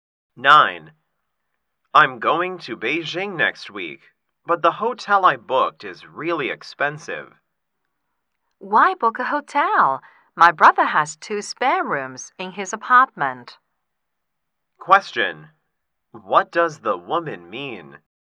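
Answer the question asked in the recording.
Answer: The man can stay at her brother's apartment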